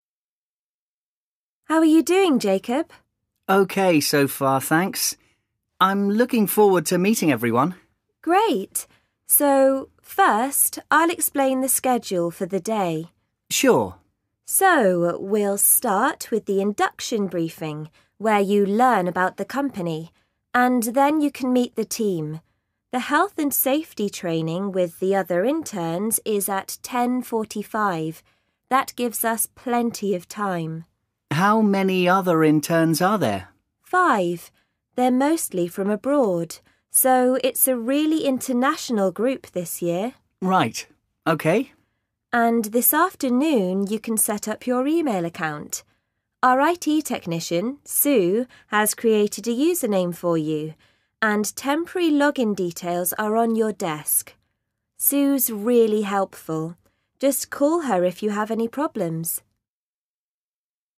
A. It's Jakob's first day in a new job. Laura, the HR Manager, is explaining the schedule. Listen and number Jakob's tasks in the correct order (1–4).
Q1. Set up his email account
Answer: 4

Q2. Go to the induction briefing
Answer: 1

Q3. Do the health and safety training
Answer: 3

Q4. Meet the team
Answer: 2

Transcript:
L: How are you doing, Jakob?
J: OK so far, thanks. I'm looking forward to meeting everyone.
L: Great. So, first, I'll explain the schedule for the day.
J: Sure.
L: So, we'll start with the induction briefing, where you learn about the company. And then you can meet the team. The health and safety training with the other interns is at 10.45. That gives us plenty of time.
J: How many other interns are there?
They're mostly from abroad, so it's a really international group this year.
L: And this afternoon you can set up your email account. Our IT technician, Sue, has created a username for you, and temporary login details are on your desk. Sue's really helpful. Just call her if you have any problems.